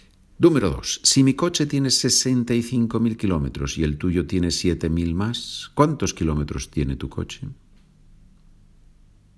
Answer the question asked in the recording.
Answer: Tu coche tiene, lógicamente, 72.000 kilómetros.